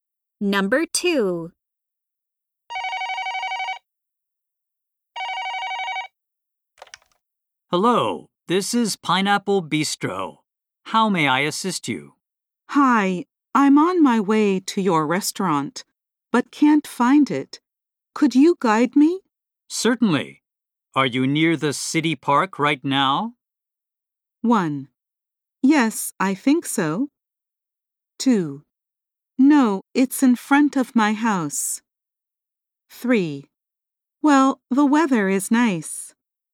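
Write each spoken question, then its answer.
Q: Certainly. Are you near the city park right now?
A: 1: Yes, I think so.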